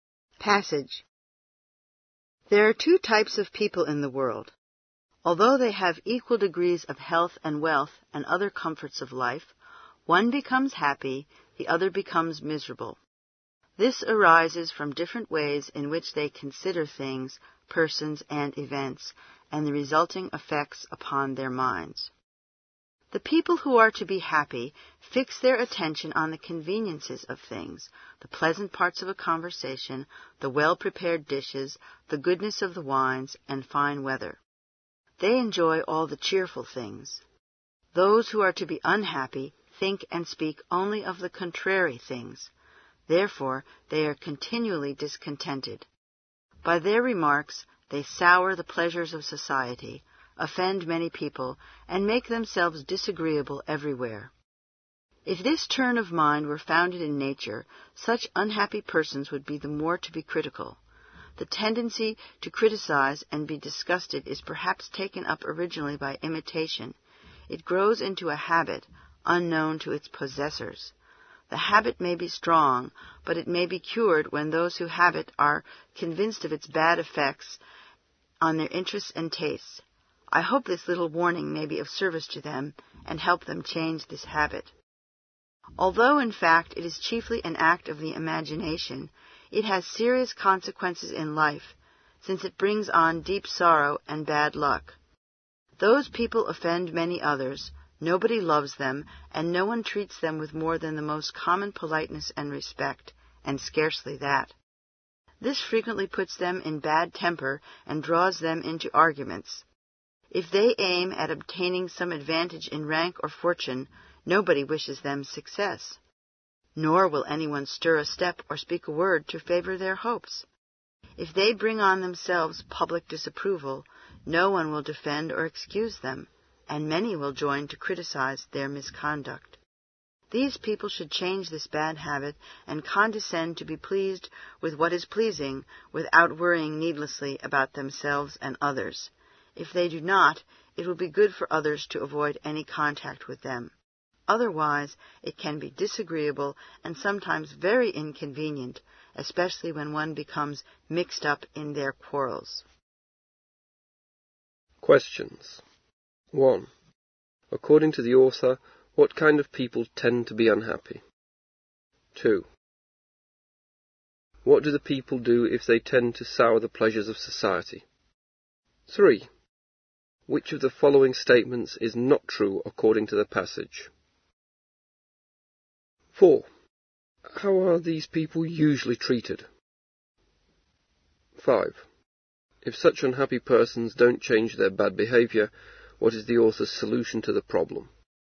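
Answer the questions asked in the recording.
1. People who think and speak only of the unpleasant things.
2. They criticize, offend many people and make themselves disagreeable.
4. Nobody loves them; they get only the most common politeness and respect, if that.
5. Others should avoid any contact with them.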